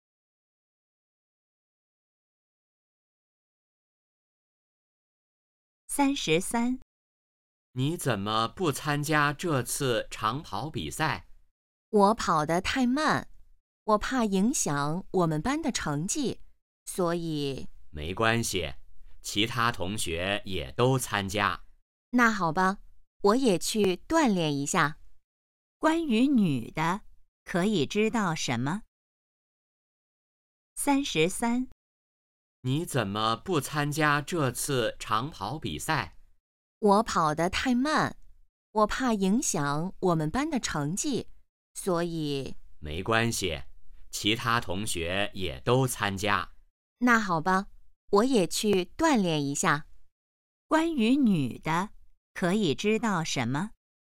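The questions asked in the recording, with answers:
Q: 关于女的,可以知道什么?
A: 跑得慢,但会参加长跑比赛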